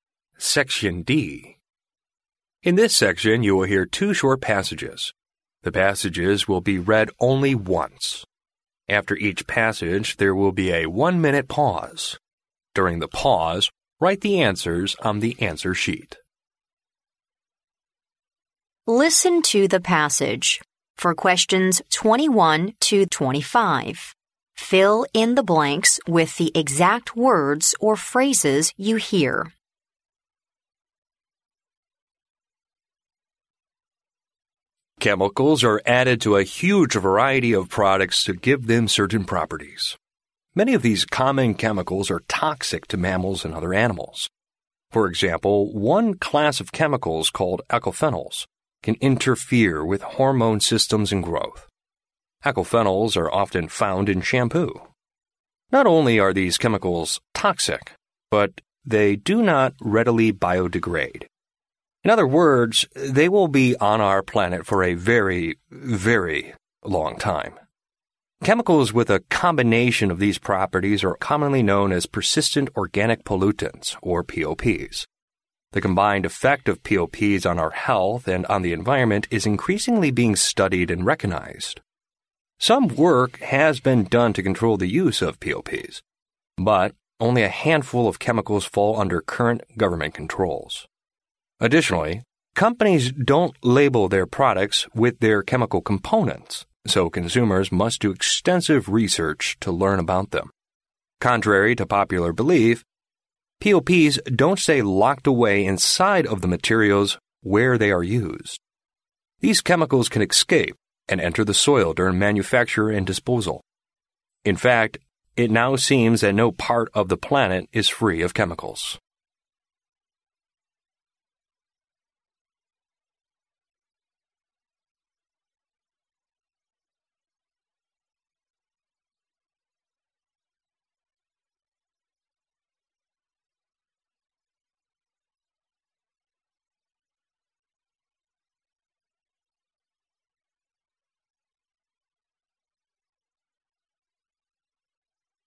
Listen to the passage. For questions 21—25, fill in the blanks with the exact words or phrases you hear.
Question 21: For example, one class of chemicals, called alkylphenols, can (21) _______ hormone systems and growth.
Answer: interfere with

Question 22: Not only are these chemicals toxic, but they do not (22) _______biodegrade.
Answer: readily

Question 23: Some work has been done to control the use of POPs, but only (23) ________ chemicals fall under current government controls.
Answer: a handful of

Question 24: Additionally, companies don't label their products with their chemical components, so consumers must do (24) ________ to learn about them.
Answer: extensive research

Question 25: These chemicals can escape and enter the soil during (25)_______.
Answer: manufacture and disposal

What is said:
In this section, you will hear two short passages. The passages will be read only once. After each passage, there will be a one-minute pause. During the pause, write the answers on the answer sheet.
Listen to the passage. For questions 21—25, fill in the blanks with the exact words or phrases you hear.
Chemicals are added to a huge variety of products to give them certain properties. Many of these common chemicals are toxic to mammals and other animals. For example, one class of chemicals, called alkylphenols, can interfere with hormone systems and growth. Alkylphenols are often found in shampoo. Not only are these chemicals toxic, but they do not readily biodegrade. In other words, they will be on our planet for a very, very long time. Chemicals with a combination of these properties are commonly known as "Persistent Organic Pollutants," or POPs. The combined effect of POPs on our health and on the environment is increasingly being studied and recognized. Some work has been done to control the use of POPs, but only a handful of chemicals fall under current government controls. Additionally, companies don't label their products with their chemical components, so consumers must do extensive research to learn about them. Contrary to popular belief, POPs don't stay locked away inside of the materials where they are used. These chemicals can escape and enter the soil during manufacture and disposal . In fact, it now seems that no part of the planet is free of chemicals.